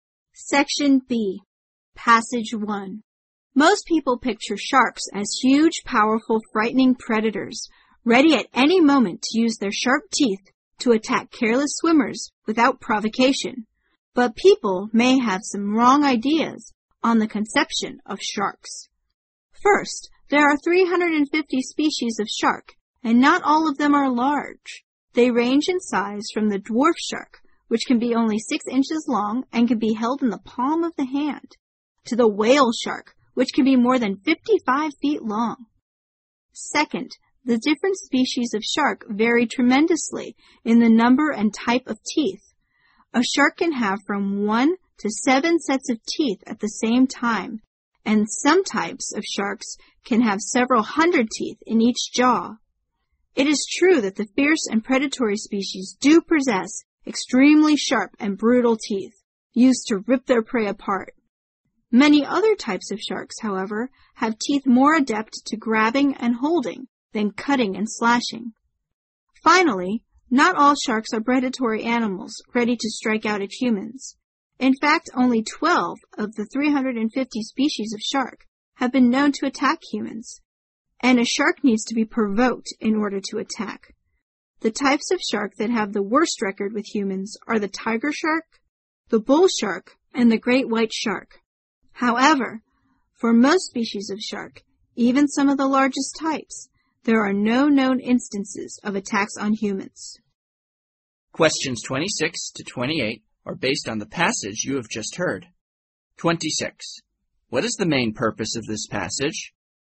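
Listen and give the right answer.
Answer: To correct wrong ideas people have about sharks.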